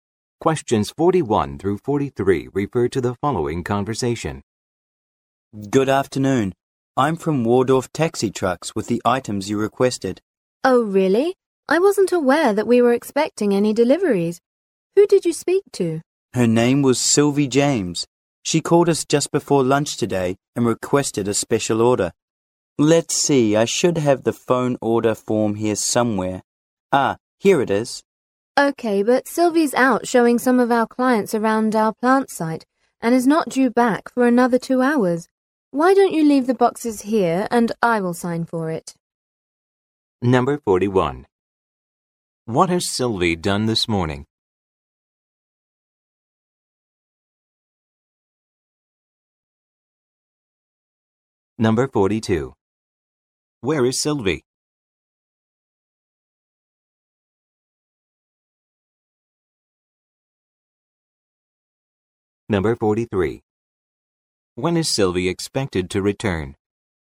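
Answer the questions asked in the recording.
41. Placed a special order
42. Showing clients around the plant site
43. In 2 hours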